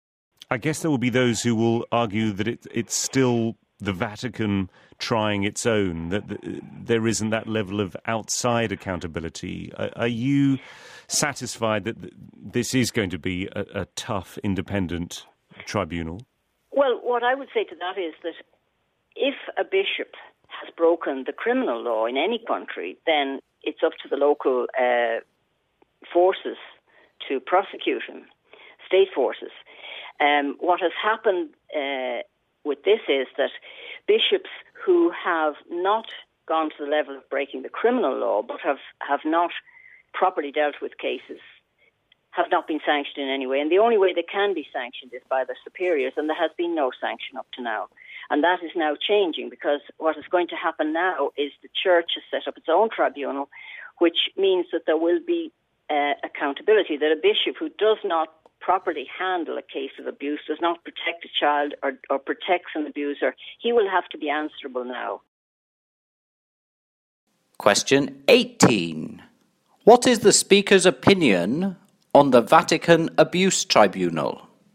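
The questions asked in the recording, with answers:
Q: What is the speaker's opinion on the Vatican Abuse Tribunal?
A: Positive: it will make bishops accountable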